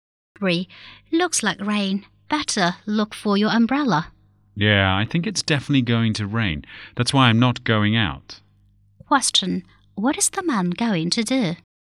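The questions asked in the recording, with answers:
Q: What is the man going to do?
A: Stay at home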